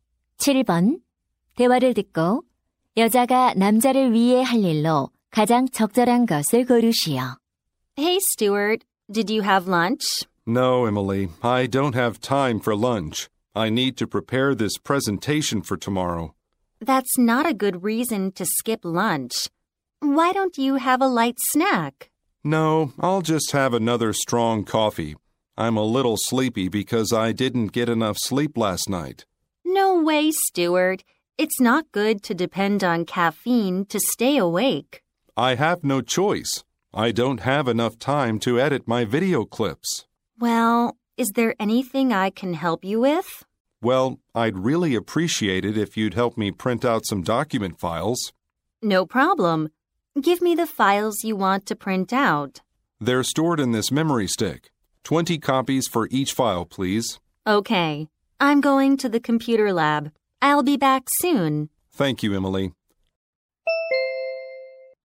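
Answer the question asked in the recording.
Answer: 문서 파일 인쇄하기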